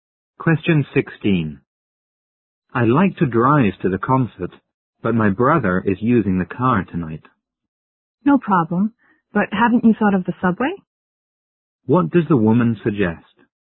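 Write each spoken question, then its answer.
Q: What does the woman suggest?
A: Taking the subway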